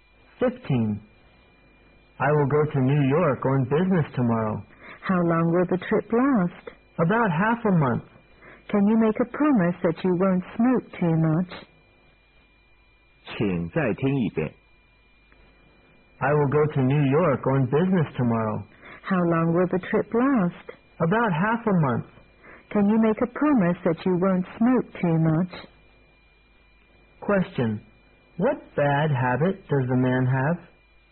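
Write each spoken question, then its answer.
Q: What bad habit does the man have?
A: Smoking too much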